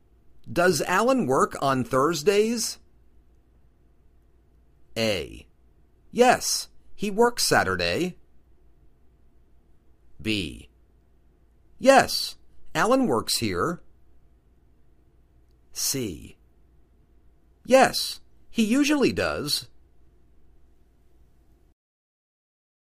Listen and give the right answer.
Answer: Yes, he usually does.